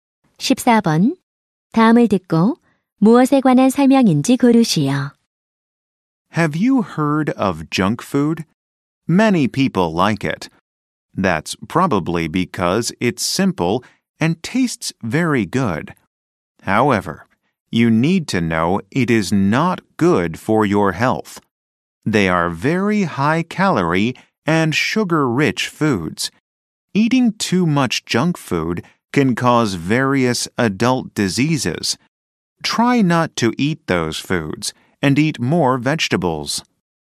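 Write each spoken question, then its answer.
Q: 14번. 다음을 듣고 무엇에 관한 설명인지 고르시오.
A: 정크 푸드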